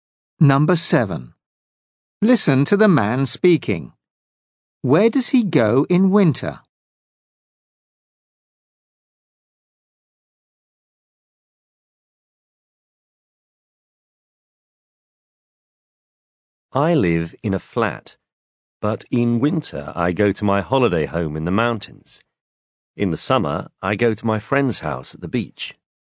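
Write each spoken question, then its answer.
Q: Where does he go in winter?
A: to his holiday home in the mountains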